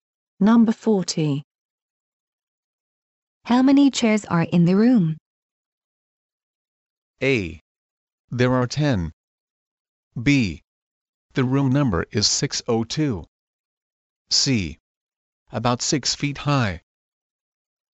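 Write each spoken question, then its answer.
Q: How many chairs are in the room?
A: A: There are 10.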